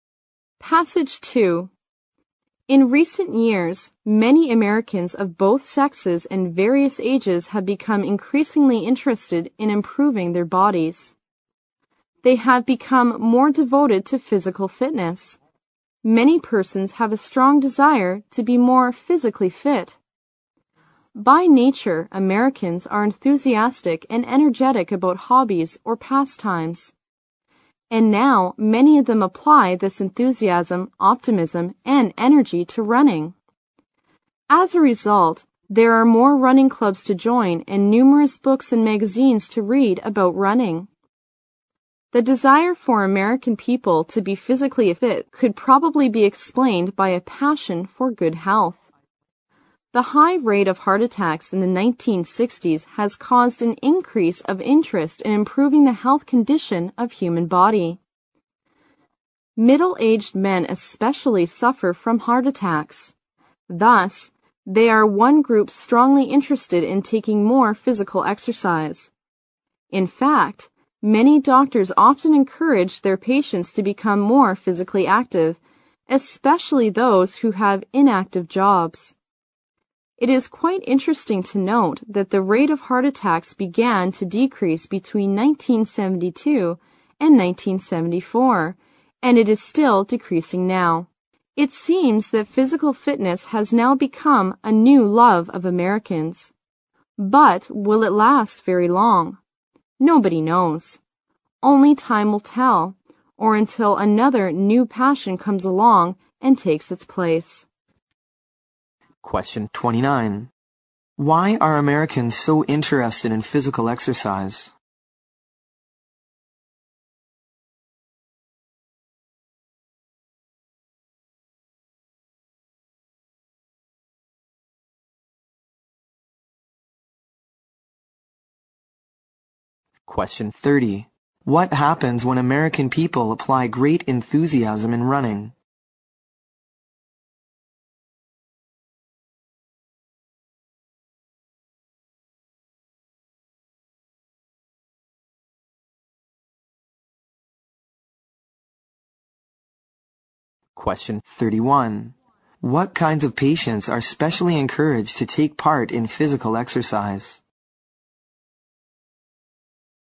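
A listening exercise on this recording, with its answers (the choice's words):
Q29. 29.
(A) Because of their hobbies and pastimes.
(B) Because of their enthusiasm for sports.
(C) Because of their fear of heart attacks.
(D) Because of their strong desire for good health.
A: Because of their strong desire for good health.

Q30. 30.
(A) More running clubs and more books about running appear.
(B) Interest in improving the fitness of human body is dropping.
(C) The number of heart-attack patients is decreasing.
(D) More people begin to take active jobs.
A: More running clubs and more books about running appear.

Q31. 31.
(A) Those who have heart attacks.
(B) Those who desire to lose weight.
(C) Those who have spare time.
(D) Those who have inactive jobs.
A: Those who have inactive jobs.

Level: 六级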